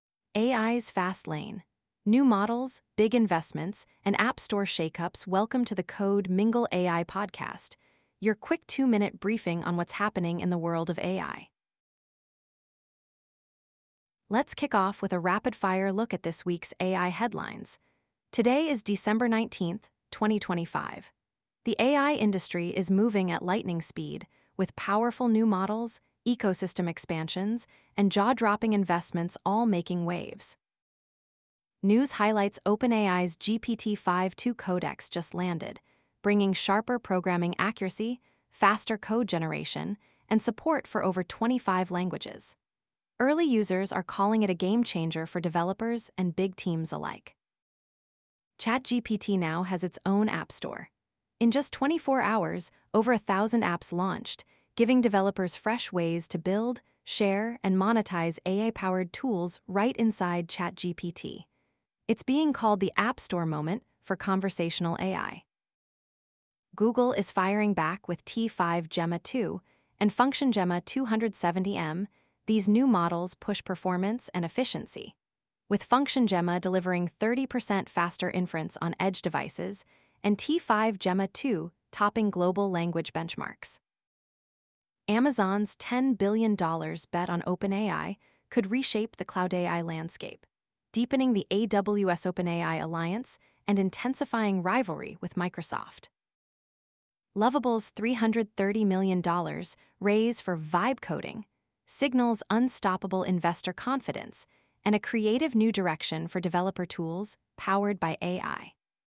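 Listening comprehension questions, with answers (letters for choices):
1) What distinguishes OpenAI's GPT-5.2-Codex from its predecessor in code generation?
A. It only supports Python programming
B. It offers improved programming accuracy and speed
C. It is designed for image synthesis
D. It is exclusively for academic research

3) Which company is reportedly negotiating a $10 billion investment in OpenAI?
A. Google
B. Amazon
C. Meta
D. Apple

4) What is a key feature of Google's FunctionGemma 270M model?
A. It is designed for image generation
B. It delivers 30% faster inference on edge devices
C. It only runs on supercomputers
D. It supports less than 5 programming languages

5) What does the $330M funding round for Lovable indicate about the AI industry?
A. Investor confidence remains strong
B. AI startups are struggling to raise capital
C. Funding is limited to large corporations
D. 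Technical breakthroughs are slowing down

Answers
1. B
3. B
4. B
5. A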